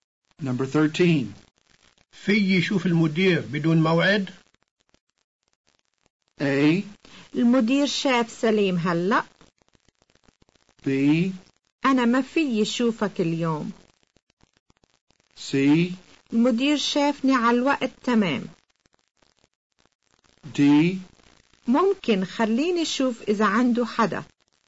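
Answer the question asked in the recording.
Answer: D: ممكن، خليني أشوف إذا عنده حدا.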